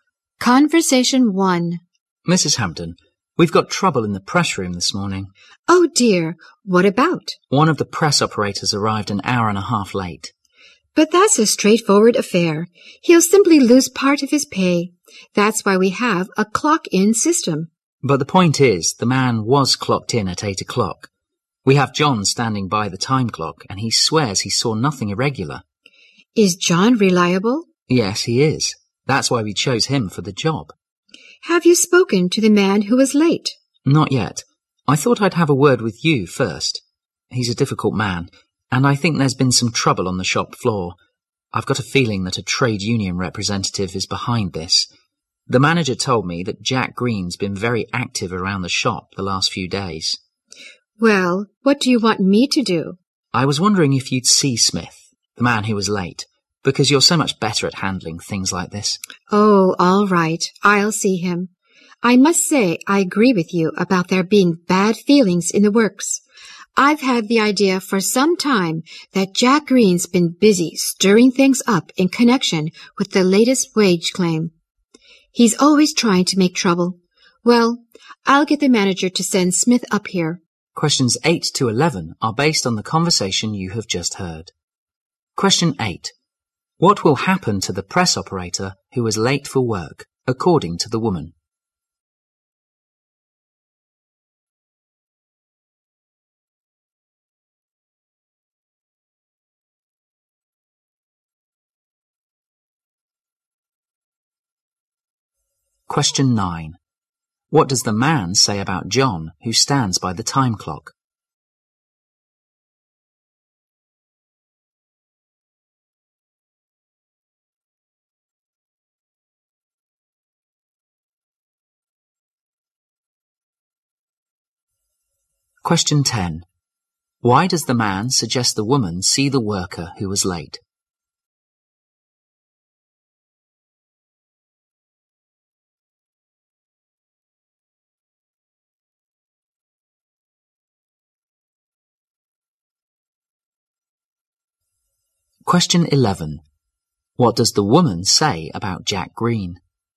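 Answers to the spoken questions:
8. He will lose part of his pay
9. He is reliable
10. She is better at handling such things
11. He is always trying to make trouble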